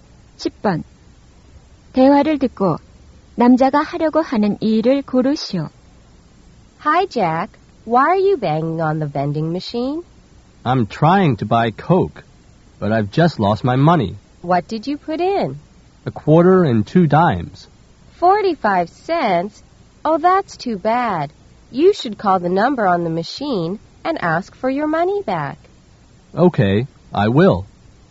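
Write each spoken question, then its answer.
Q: 대화를 듣고 남자가 하려고 하는 일을 고르시오.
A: 자판기에 적힌 번호로 전화해 돈을 돌려받으려고 한다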